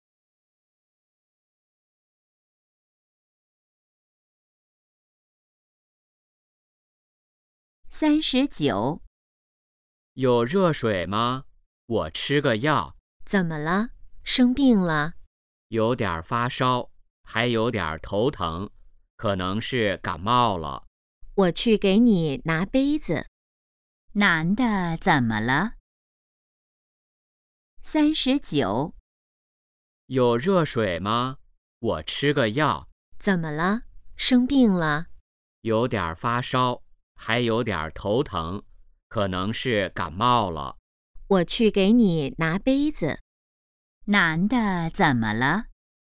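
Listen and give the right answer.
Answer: 可能感冒了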